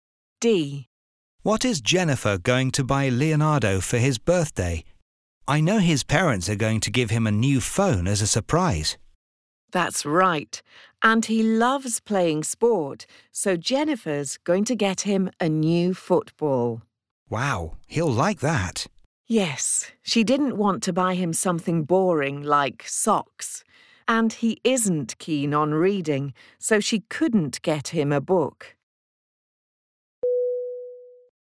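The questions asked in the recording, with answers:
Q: What is Jennifer going to buy Leonardo for his birthday?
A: A new football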